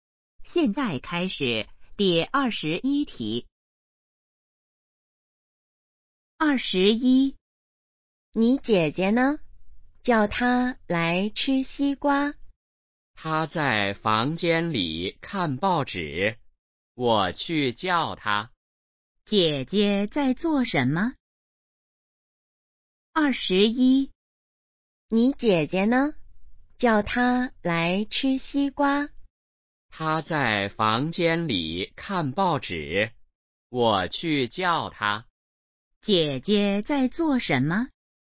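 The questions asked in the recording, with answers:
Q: 姐姐在做什么?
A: 看报纸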